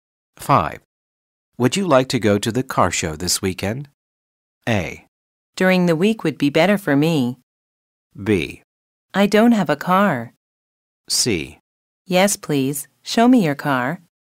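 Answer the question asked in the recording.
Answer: A: During the week would be better for me.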